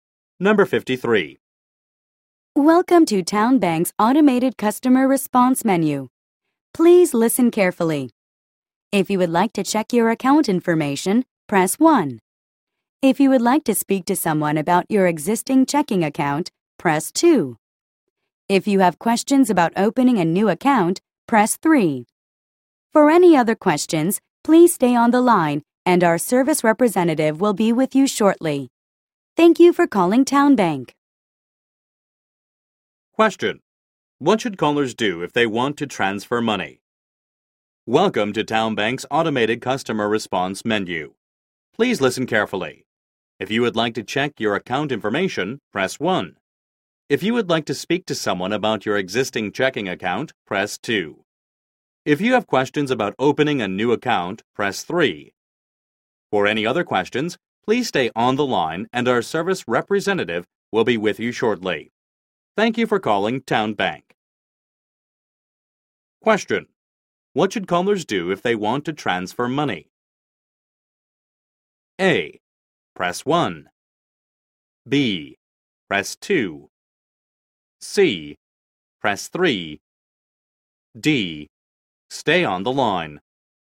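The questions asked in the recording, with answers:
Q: What should callers do if they want to transfer money?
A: D: Stay on the line.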